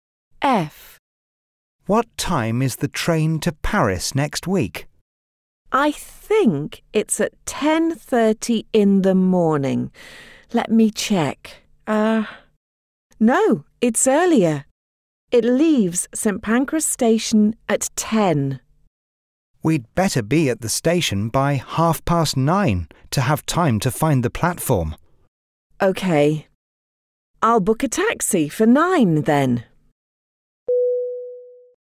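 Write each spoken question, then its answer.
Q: What time is the train to Paris next week?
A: 10 o'clock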